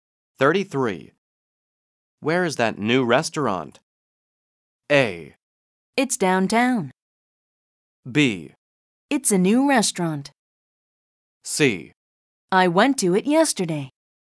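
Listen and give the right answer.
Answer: A: It's downtown.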